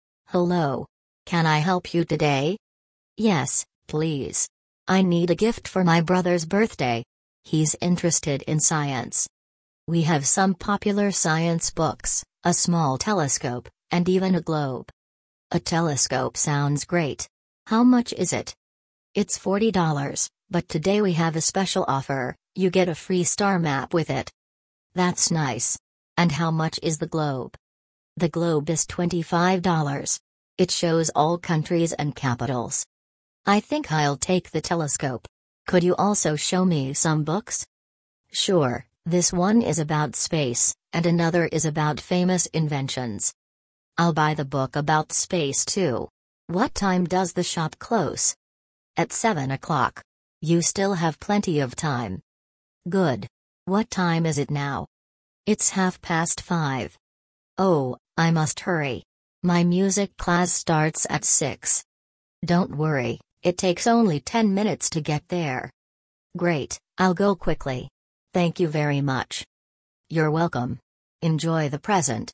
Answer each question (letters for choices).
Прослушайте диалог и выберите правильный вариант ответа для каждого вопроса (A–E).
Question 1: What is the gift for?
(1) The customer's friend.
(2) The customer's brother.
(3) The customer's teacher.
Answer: 2

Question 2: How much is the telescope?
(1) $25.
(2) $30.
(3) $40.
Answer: 3

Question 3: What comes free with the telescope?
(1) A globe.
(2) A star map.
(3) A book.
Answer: 2

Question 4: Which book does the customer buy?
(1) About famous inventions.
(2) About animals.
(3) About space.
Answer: 3

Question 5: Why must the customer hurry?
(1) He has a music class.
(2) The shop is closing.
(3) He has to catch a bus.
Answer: 1

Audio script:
– Hello! Can I help you today?
– Yes, please. I need a gift for my brother's birthday. He's interested in science.
– We have some popular science books, a small telescope, and even a globe.
– A telescope sounds great! How much is it?
– It's $40, but today we have a special offer: you get a free star map with it.
– That's nice. And how much is the globe?
– The globe is $25. It shows all countries and capitals.
– I think I'll take the telescope. Could you also show me some books?
– Sure, this one is about space, and another is about famous inventions.
– I'll buy the book about space too. What time does the shop close?
– At seven o'clock. You still have plenty of time.
– Good. What time is it now?
– It's half past five.
– Oh, I must hurry! My music class starts at six.
– Don't worry, it takes only ten minutes to get there.
– Great, I'll go quickly. Thank you very much!
– You're welcome. Enjoy the present!